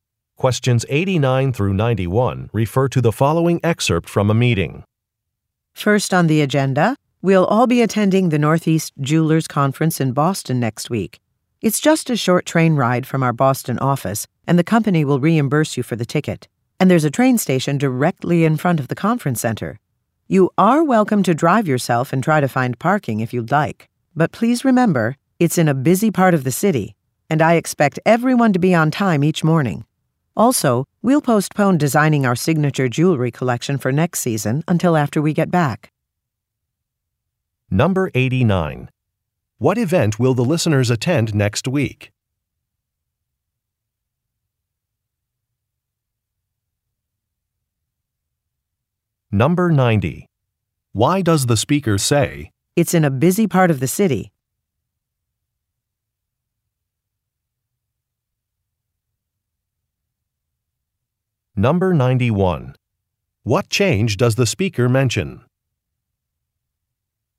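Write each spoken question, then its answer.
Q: What event will the listeners attend next week?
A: A jewelers conference

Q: What change does the speaker mention?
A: Designing the jewelry collection is postponed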